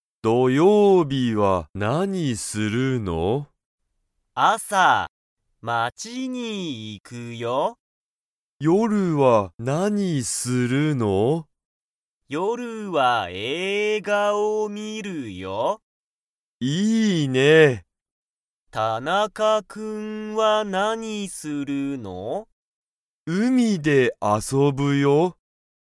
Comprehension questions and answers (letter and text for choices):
田中(たなか)くんは、映画(えいが)に行(い)きますか?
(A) はい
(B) いいえ)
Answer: (B) いいえ)